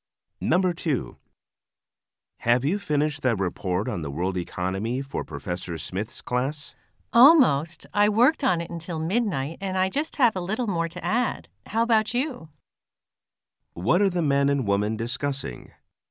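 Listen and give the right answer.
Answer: A report on the world economy for Professor Smith's class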